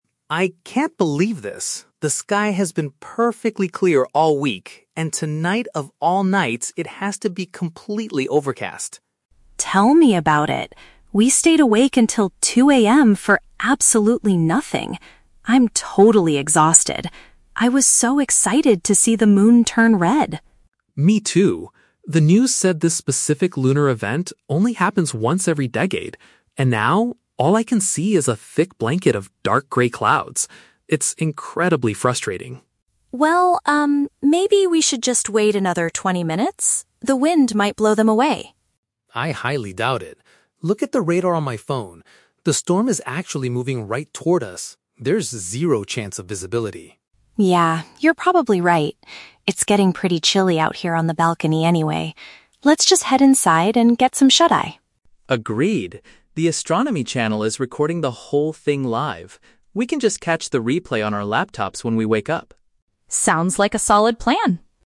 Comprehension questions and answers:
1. Why is Ben feeling so frustrated right now?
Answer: Because the heavy clouds are completely blocking the night sky.

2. What is special about the event they were trying to observe?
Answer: It only occurs one time in a ten-year period.

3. What do the two friends finally decide to do?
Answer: Go to bed and view the recorded video the next day.

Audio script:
Ben: I can't believe this. The sky has been perfectly clear all week, and tonight, of all nights, it has to be completely overcast.
Lily: Tell me about it. We stayed awake until 2:00 AM for absolutely nothing. I'm totally exhausted. I was so excited to see the moon turn red.
Ben: Me too. The news said this specific lunar event only happens once every decade. And now, all I can see is a thick blanket of dark grey clouds. It's incredibly frustrating.
Lily: Well, um, maybe we should just wait another twenty minutes? The wind might blow them away.
Ben: I highly doubt it. Look at the radar on my phone. The storm is actually moving right toward us. There's zero chance of visibility.
Lily: Yeah, you're probably right. It's getting pretty chilly out here on the balcony anyway. Let's just head inside and get some shut-eye.
Ben: Agreed. The astronomy channel is recording the whole thing live.